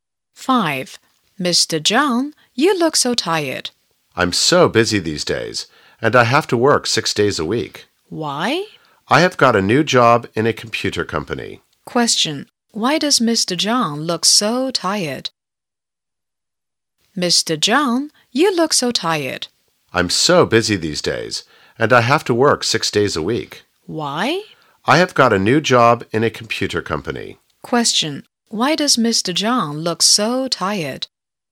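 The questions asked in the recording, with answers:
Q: Why does Mr. John look so tired?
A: He has a new job at a computer company and works 6 days a week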